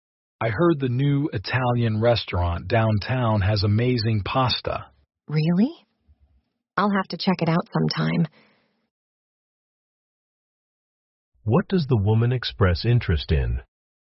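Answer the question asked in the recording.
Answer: Trying the new Italian restaurant downtown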